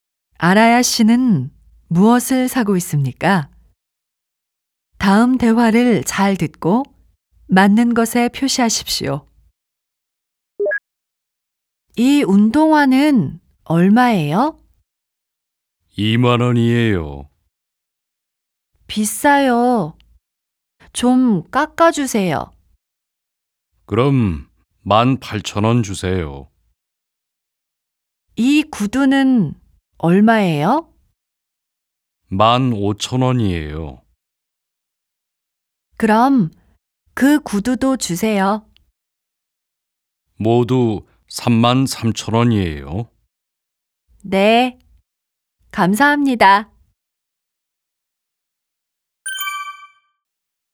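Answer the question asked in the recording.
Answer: 운동화와 구두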